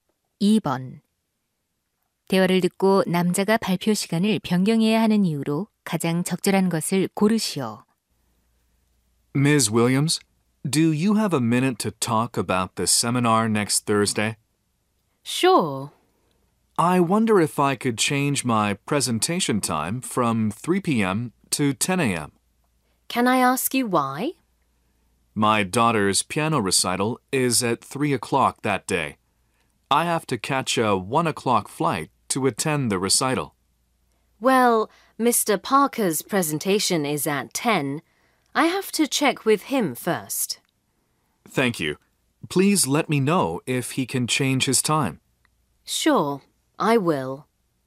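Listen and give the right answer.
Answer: 딸의 피아노 연주회에 참석해야 해서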